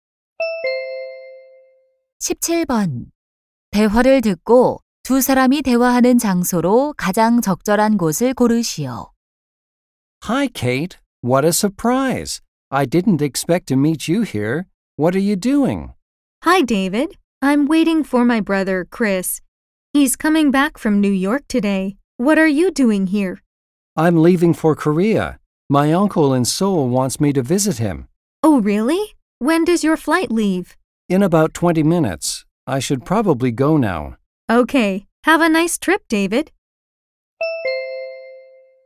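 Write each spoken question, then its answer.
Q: 대화를 듣고 두 사람이 대화하는 장소로 가장 적절한 곳을 고르시오.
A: 공항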